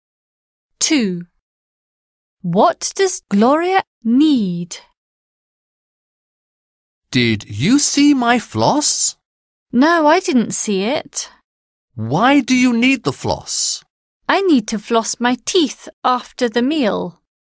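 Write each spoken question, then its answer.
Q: What does Gloria need?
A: Floss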